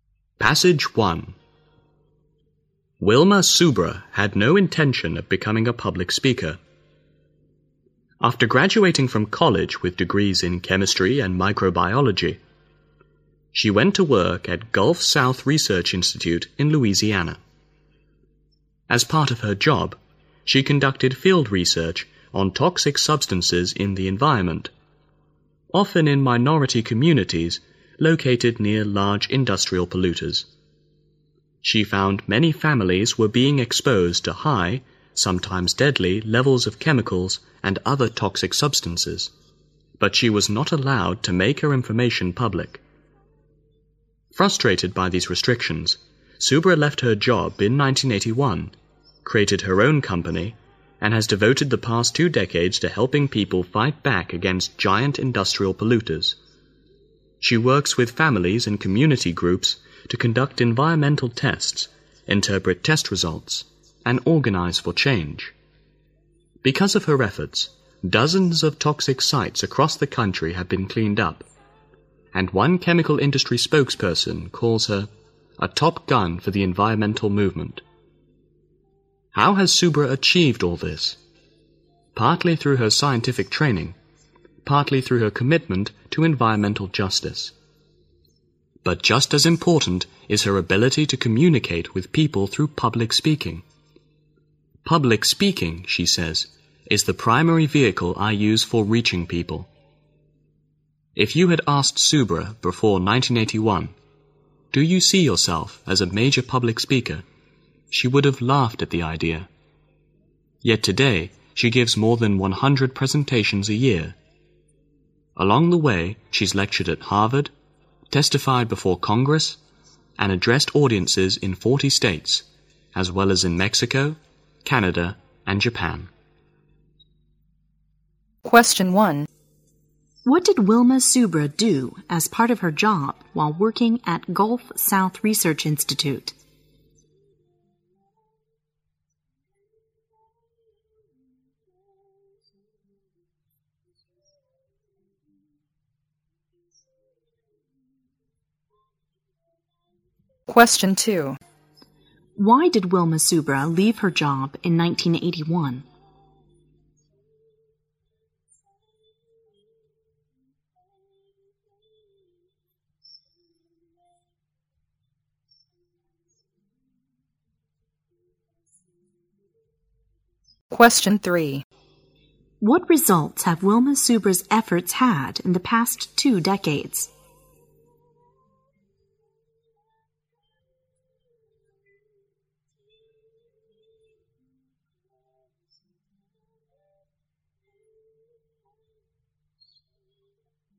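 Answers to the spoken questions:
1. She did field research on toxic substances in the environment.
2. She wasn't allowed to make her findings public.
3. Dozens of toxic sites across the country have been cleaned up.
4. Her scientific training, her commitment to environmental justice and her public speaking skills.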